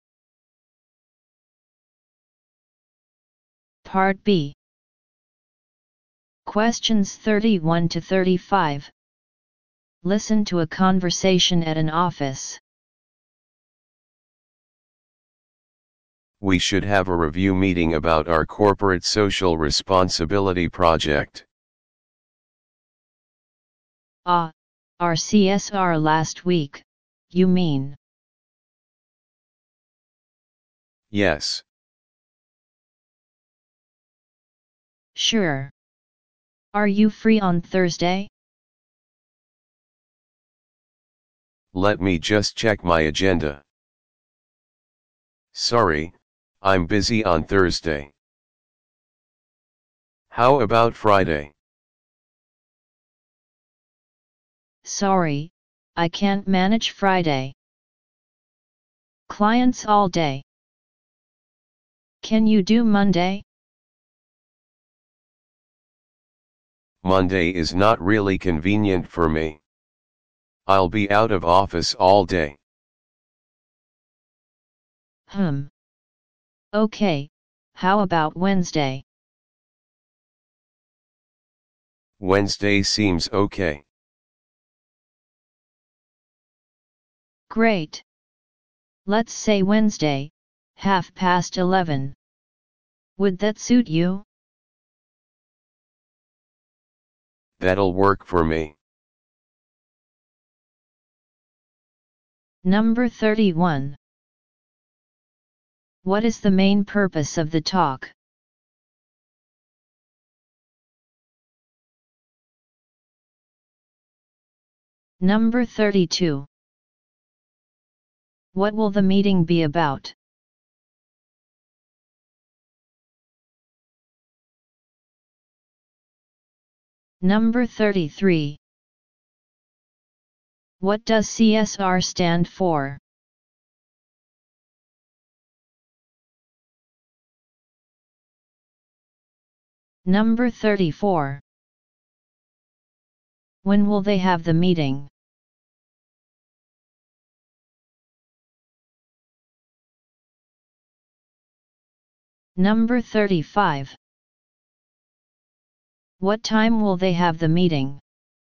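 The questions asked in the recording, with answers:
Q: What is the main purpose of the talk?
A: To arrange a review meeting

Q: What will the meeting be about?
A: Reviewing their corporate social responsibility project

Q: What does CSR stand for?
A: Corporate social responsibility

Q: When will they have the meeting?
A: On Wednesday

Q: What time will they have the meeting?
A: 11:30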